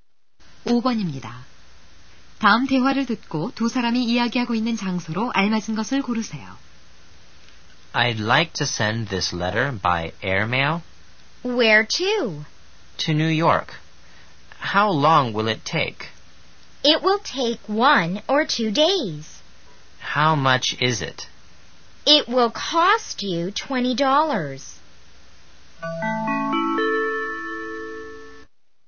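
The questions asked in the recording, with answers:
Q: 다음 대화를 듣고 두 사람이 이야기하고 있는 장소로 알맞은 것을 고르세요.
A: 우체국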